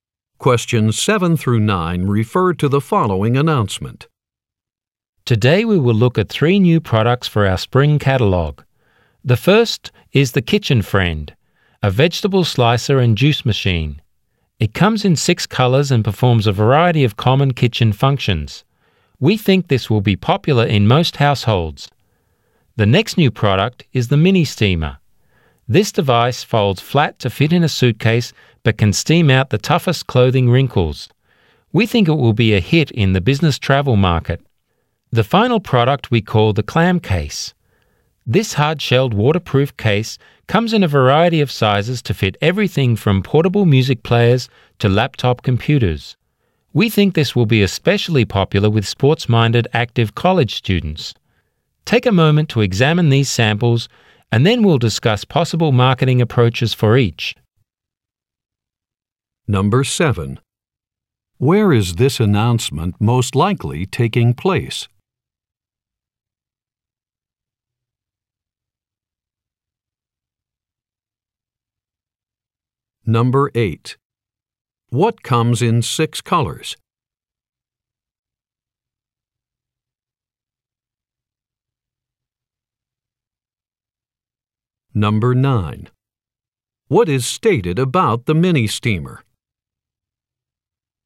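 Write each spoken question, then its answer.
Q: What comes in 6 colors?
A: The Kitchen Friend

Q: What is stated about the mini steamer?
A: It folds flat to fit in a suitcase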